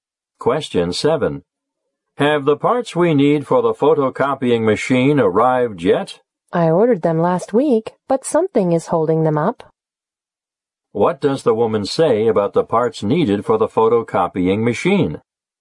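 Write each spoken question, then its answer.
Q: What does the woman say about the parts needed for the photocopying machine?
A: They were ordered last week but have been delayed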